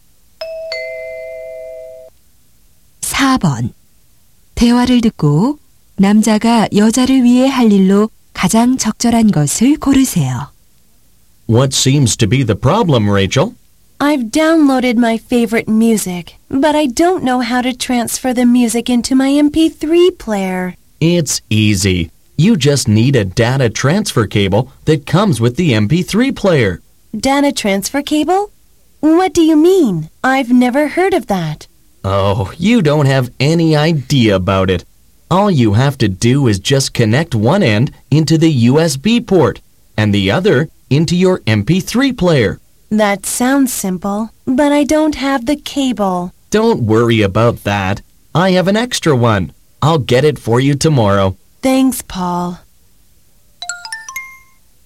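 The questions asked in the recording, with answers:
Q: 대화를 듣고 남자가 여자를 위해 할 일로 가장 적절한 것을 고르세요.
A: 데이터 전송 케이블 가져다주기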